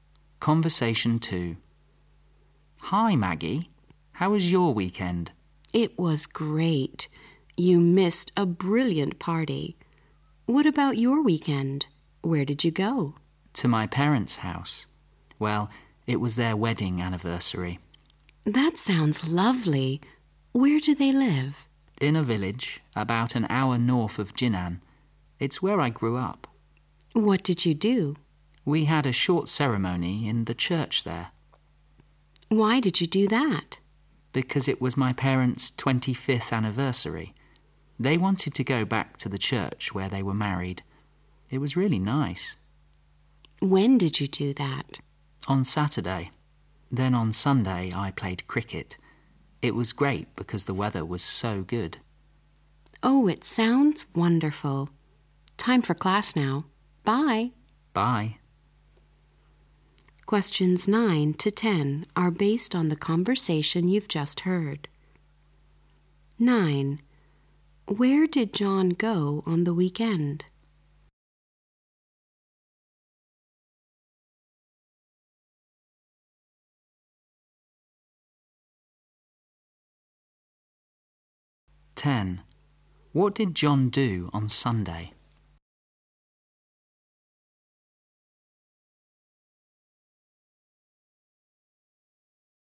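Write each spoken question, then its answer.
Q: Where did John go on the weekend?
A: To his parents' house

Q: What did John do on Sunday?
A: He played cricket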